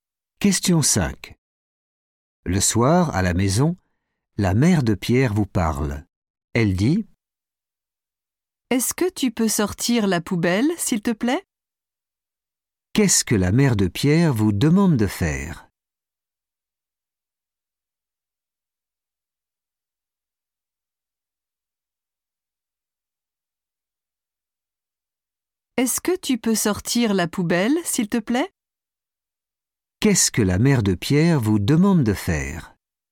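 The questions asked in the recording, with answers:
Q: Qu'est-ce que la mère de Pierre vous demande de faire ?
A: sortir la poubelle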